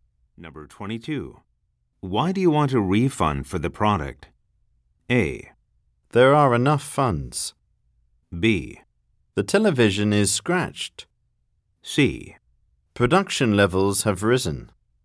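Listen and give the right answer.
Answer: B: The television is scratched.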